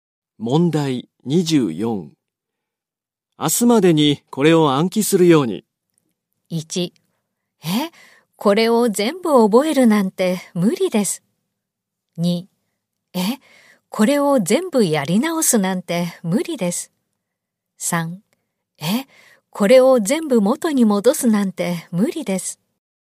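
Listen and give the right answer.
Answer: 1: え、これを全部覚えるなんて無理です。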